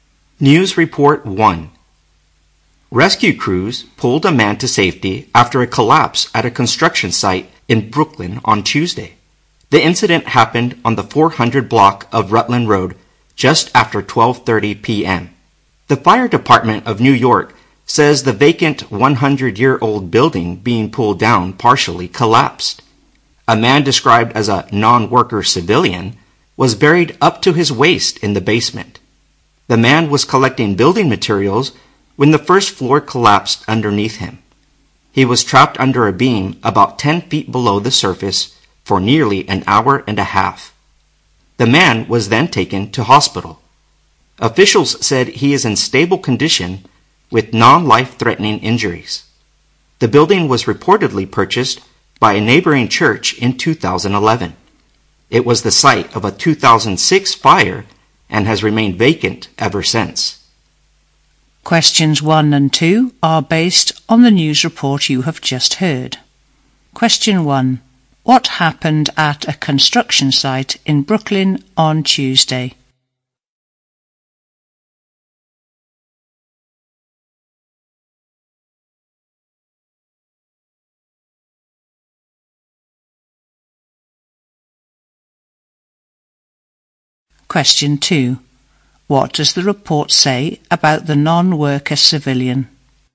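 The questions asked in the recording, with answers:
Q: What happened at a construction site in Brooklyn on Tuesday?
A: A vacant old building being pulled down partially collapsed and trapped a man.

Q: What does the report say about the non-worker civilian?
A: He was buried in the basement while collecting building materials; he is now in stable condition.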